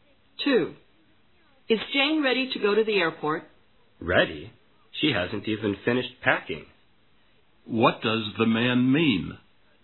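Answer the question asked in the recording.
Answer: Jane is far from ready; she hasn't finished packing.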